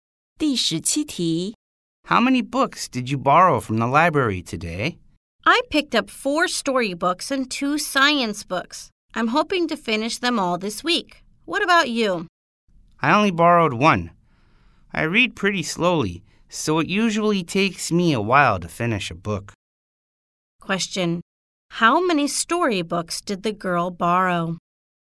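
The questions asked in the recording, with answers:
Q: How many storybooks did the girl borrow?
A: Four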